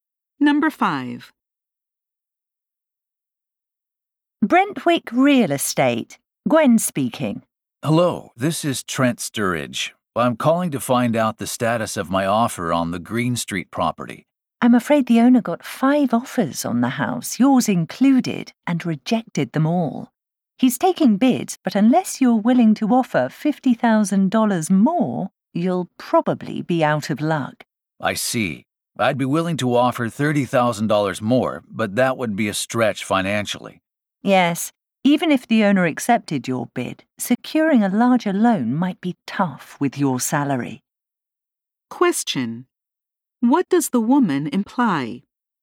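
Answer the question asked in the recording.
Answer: The man probably can't afford to make a winning offer; a larger loan would be hard to get on his salary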